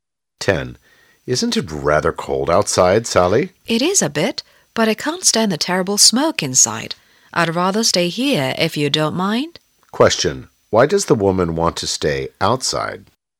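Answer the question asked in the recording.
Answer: She can't stand the smoke inside.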